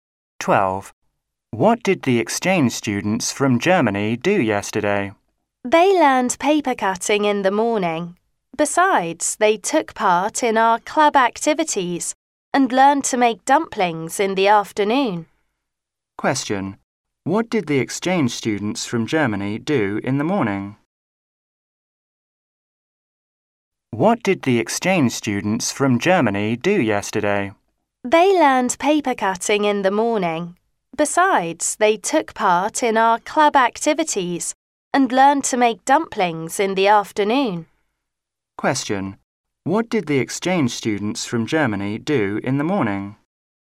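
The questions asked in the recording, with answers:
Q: Question. What did the exchange students from Germany do in the morning?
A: They learned paper cutting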